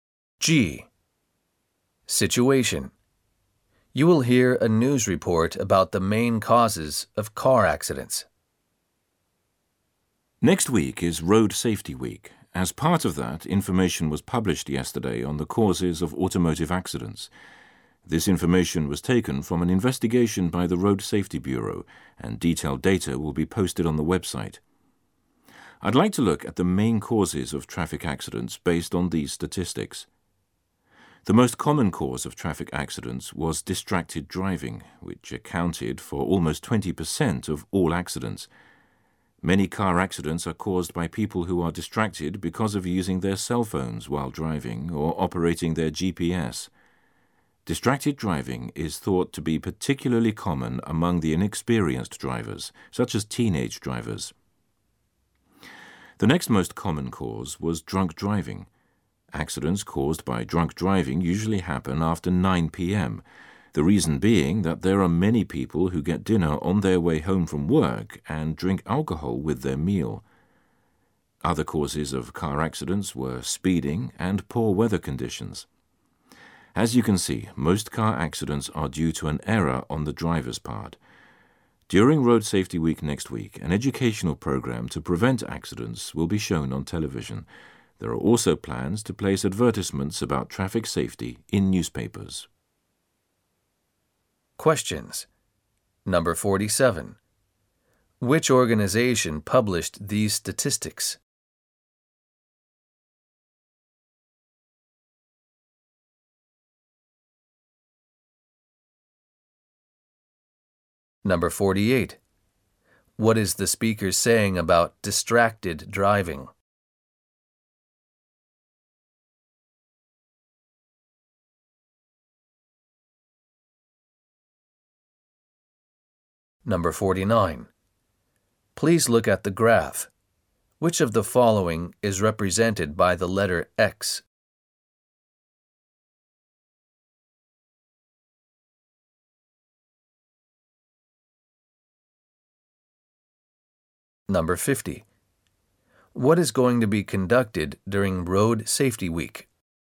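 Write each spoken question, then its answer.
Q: Which organization published these statistics?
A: The Road Safety Bureau

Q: What is the speaker saying about distracted driving?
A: It is the most common cause, almost 20% of accidents, especially among inexperienced drivers

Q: What is going to be conducted during Road Safety Week?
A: An educational program to prevent accidents will be shown on television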